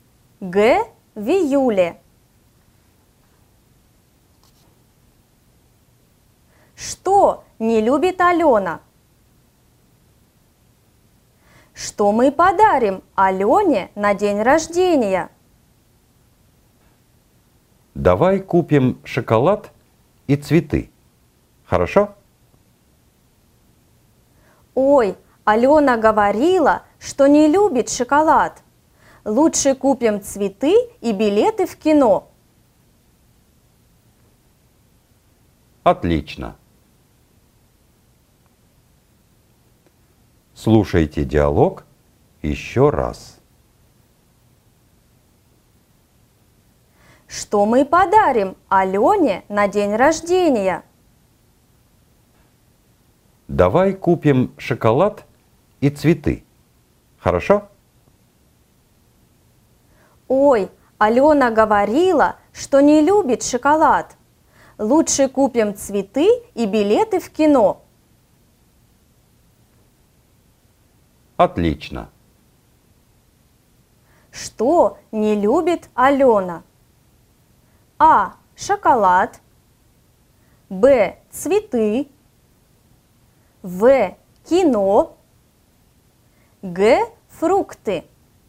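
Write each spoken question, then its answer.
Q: Что не любит Алена?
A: А: Шоколад.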